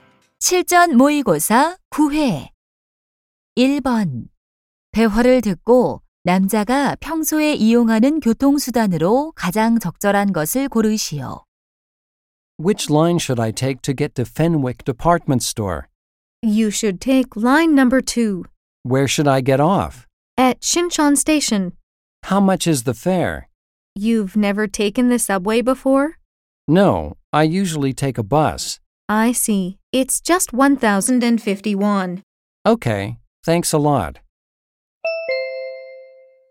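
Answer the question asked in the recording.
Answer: 버스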